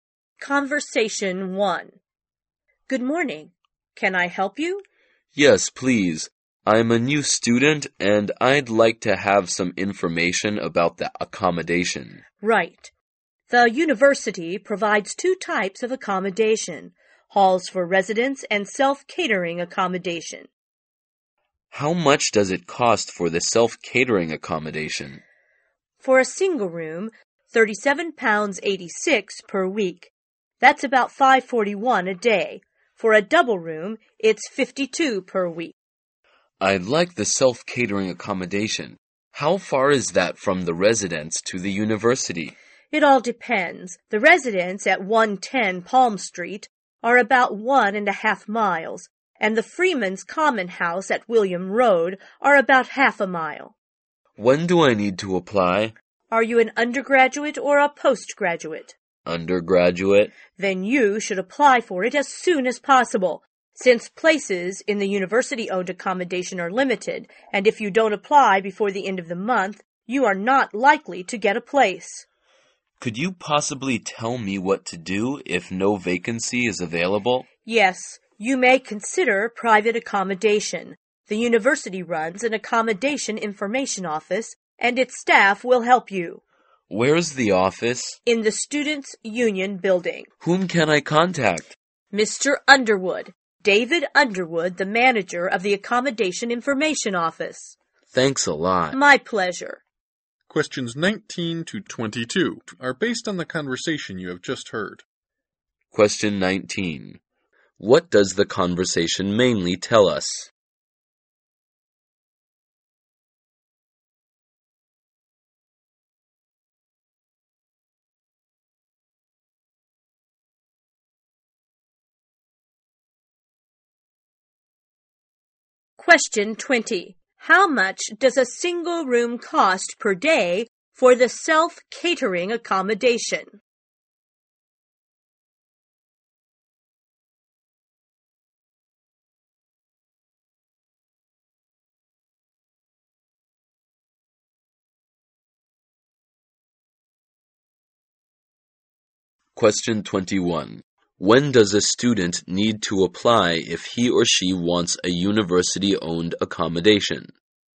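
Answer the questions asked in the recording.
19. Information about university accommodation
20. About 5.41 a day
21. As soon as possible, before the end of the month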